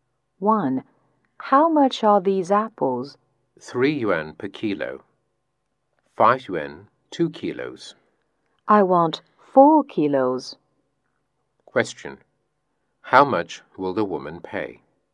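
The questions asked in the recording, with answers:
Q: How much will the woman pay?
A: 10 yuan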